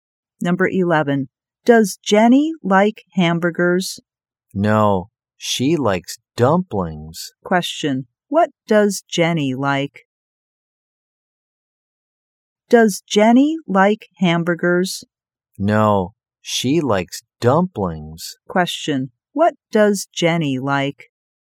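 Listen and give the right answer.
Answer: Dumplings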